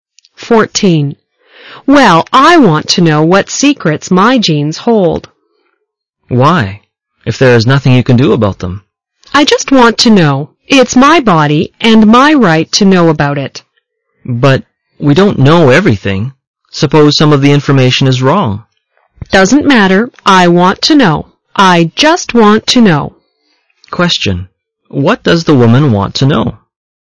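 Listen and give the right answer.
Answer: The secrets her genes hold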